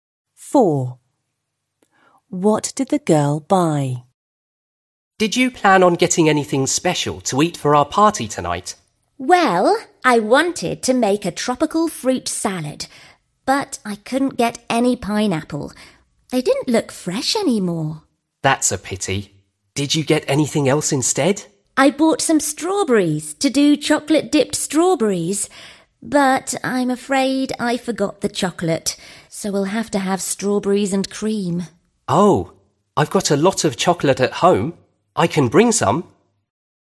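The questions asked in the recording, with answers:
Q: What did the girl buy?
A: Strawberries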